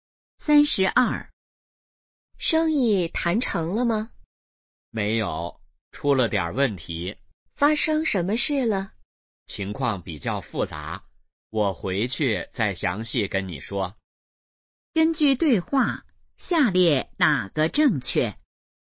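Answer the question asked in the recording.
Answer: 生意没谈成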